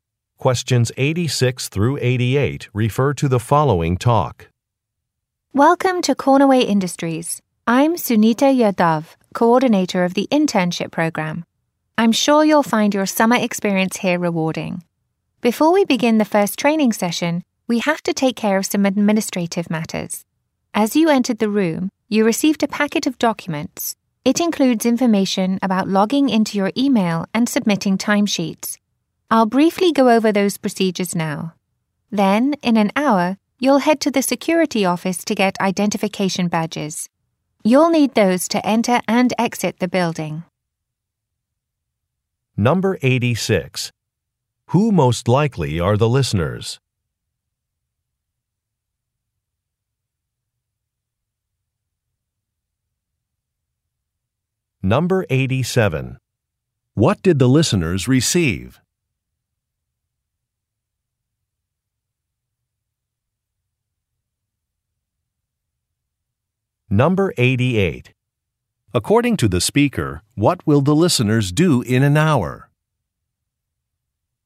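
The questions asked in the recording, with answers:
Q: Who most likely are the listeners?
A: New interns

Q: What did the listeners receive?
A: A packet of documents

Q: According to the speaker, what will the listeners do in an hour?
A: Go to the security office to get identification badges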